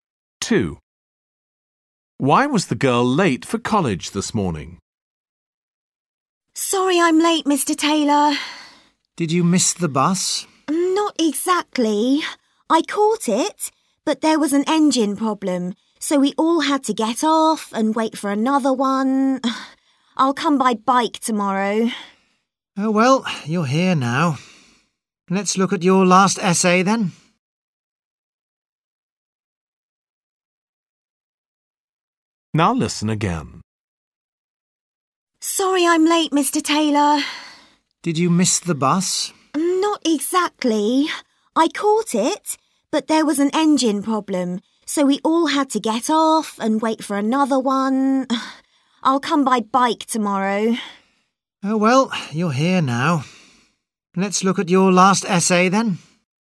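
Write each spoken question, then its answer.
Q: Why was the girl late for college this morning?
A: The bus had an engine problem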